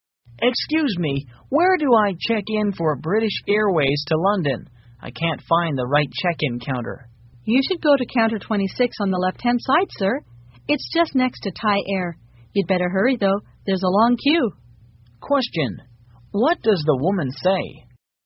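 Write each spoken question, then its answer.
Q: What does the woman say?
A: He should go to counter 26 on the left, next to Thai Air, and hurry because there is a long queue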